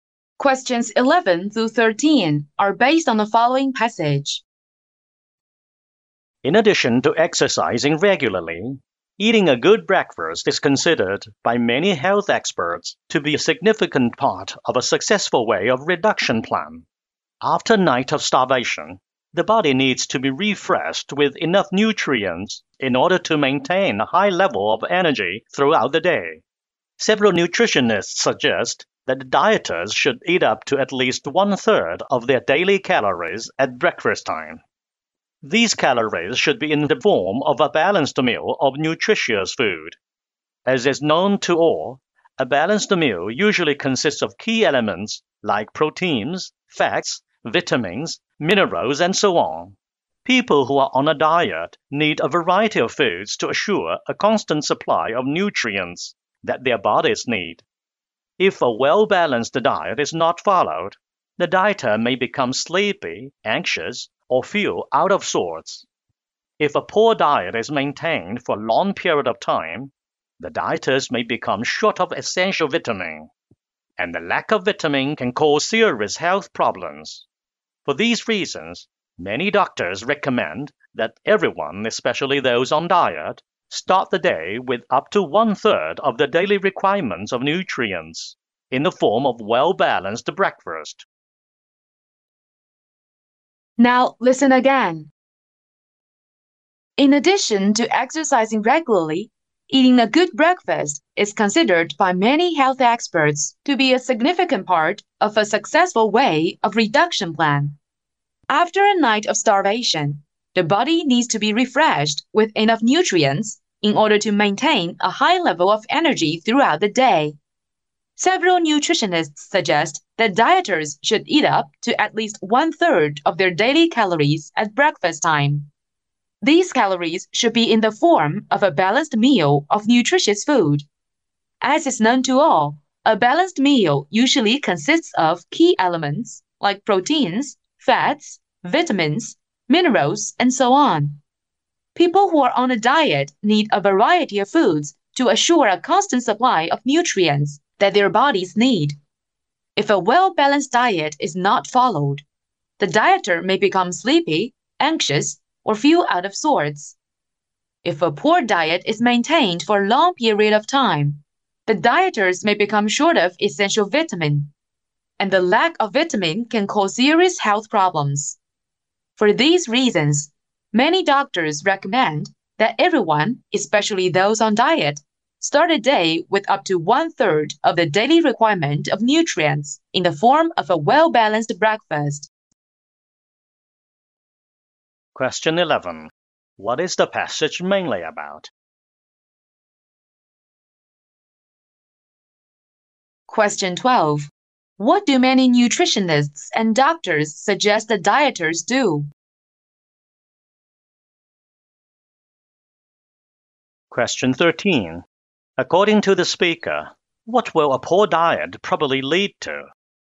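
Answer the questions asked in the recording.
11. The importance of a good breakfast for losing weight
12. Eat at least one-third of their daily calories at breakfast
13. A lack of vitamins, causing serious health problems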